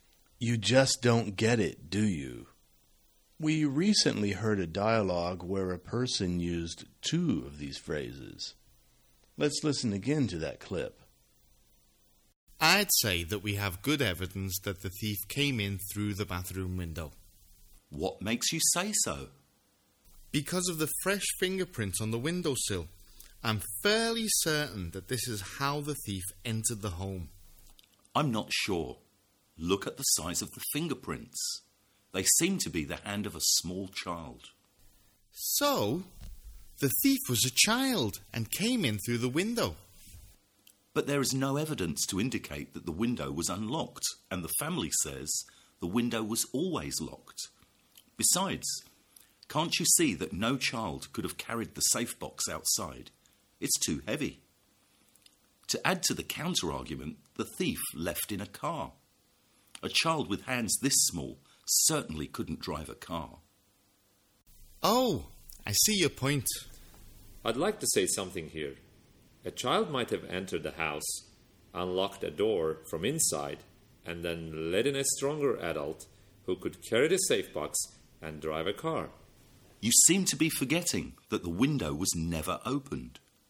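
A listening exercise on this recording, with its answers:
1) [Speaker 1]: _______ we have good evidence that the thief came in through the bathroom window.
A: I'd say that

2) [Speaker 2]: _______?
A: What makes you say so

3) _______ this is how the thief entered the home.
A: I'm fairly certain that

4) [Speaker 2]: _______. Look at the size of the fingerprints.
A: I'm not sure

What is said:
Stick to the point
You just don't get it, do you?
We recently heard a dialogue where a person used two of these phrases. Let's listen again to that clip.
[Speaker 1]: Because of the fresh fingerprints on the window sill.
Look at the size of the fingerprints. They seem to be the hand of a small child.
[Speaker 1]: So, the thief was a child, and came in through the window.
[Speaker 2]: But there is no evidence to indicate that the window was unlocked. And the family says, the window was always locked. 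Besides, can't you see that no child could have carried the safe box outside. It's too heavy. To add to the counter-argument, the thief left in a car. A child with hands this small certainly couldn't drive a car.
[Speaker 3]: I'd like to say something here. A child might have entered the house, unlocked the door, from inside, and then let in a stronger adult, who could carry the safebox and drive a car.
[Speaker 2]: You seem to be forgetting that the window was never opened.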